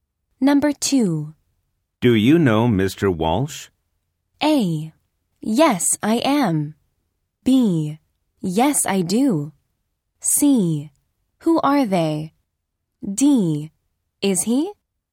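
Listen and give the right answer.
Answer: B: Yes, I do.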